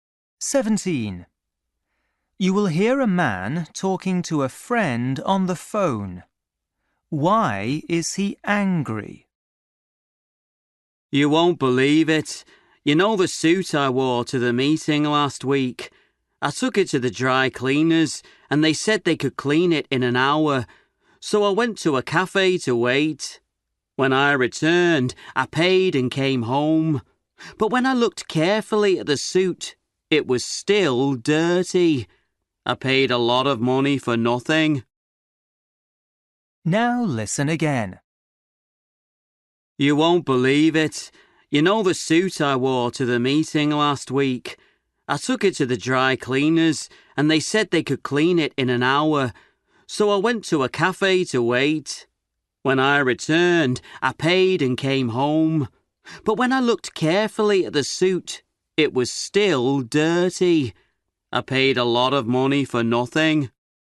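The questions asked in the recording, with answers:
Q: Why is he angry?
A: He paid a lot but the suit was still dirty after cleaning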